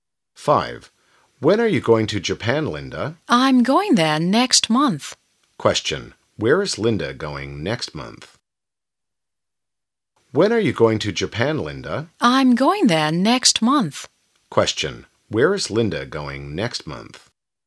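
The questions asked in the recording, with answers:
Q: Where is Linda going next month?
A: To Japan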